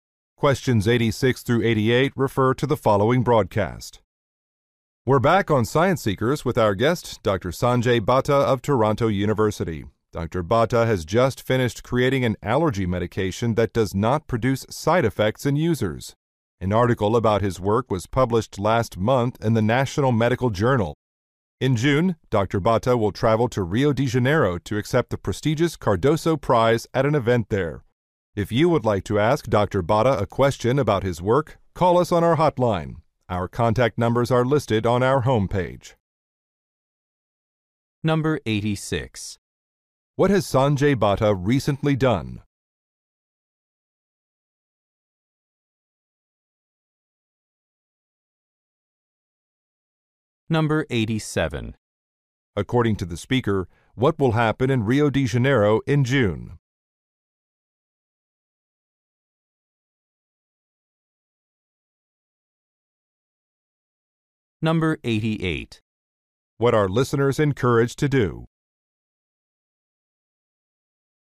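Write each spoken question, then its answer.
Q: What has Sanjay Bhatta recently done?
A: Developed an allergy medication without side effects

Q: According to the speaker, what will happen in Rio de Janeiro in June?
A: Dr. Bhatta will receive an award (the Cardoso Prize)

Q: What are listeners encouraged to do?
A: Call the hotline with questions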